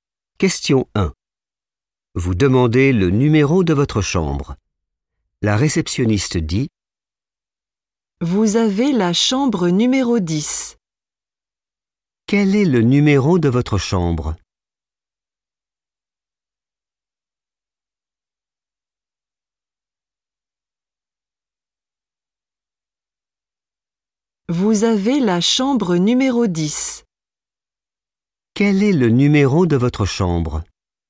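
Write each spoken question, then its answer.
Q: Quel est le numéro de votre chambre?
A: 10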